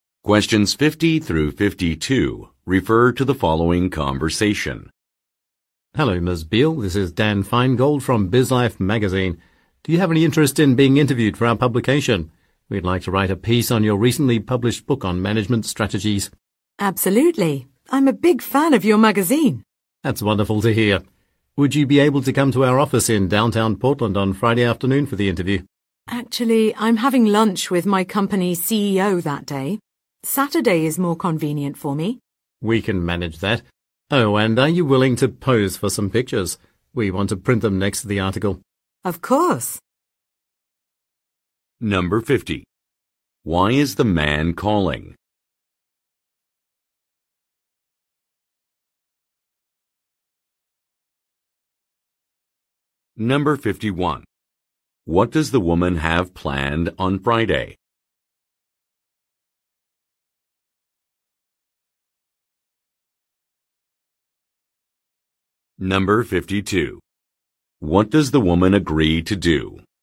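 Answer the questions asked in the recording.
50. To request an interview about her book
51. Lunch with her company's CEO
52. Pose for some pictures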